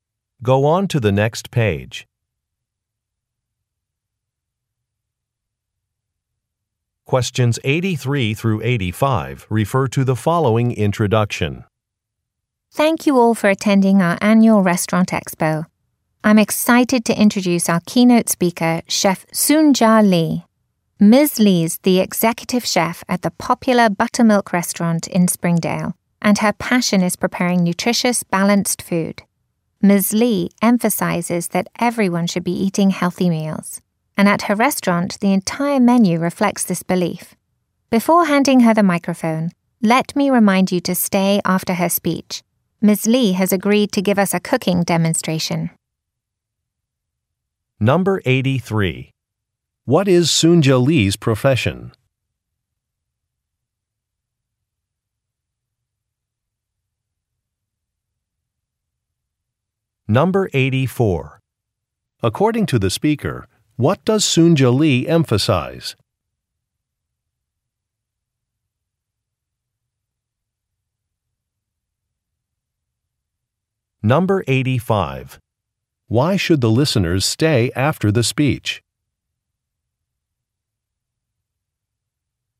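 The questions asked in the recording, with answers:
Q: What is Soon-Ja Lee's profession?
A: A chef

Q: According to the speaker, what does Soon-Ja Lee emphasize?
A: Eating healthy meals

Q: Why should the listeners stay after the speech?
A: To watch a cooking demonstration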